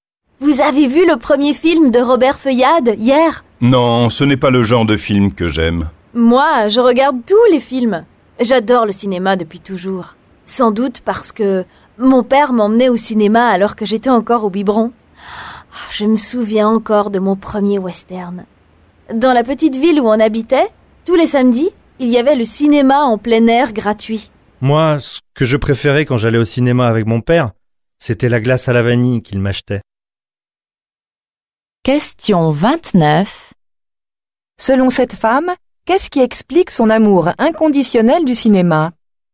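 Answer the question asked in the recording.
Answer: Son père l'emmenait au cinéma dès sa petite enfance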